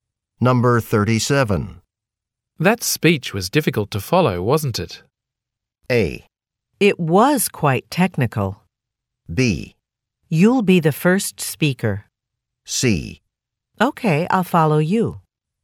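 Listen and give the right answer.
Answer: A: It was quite technical.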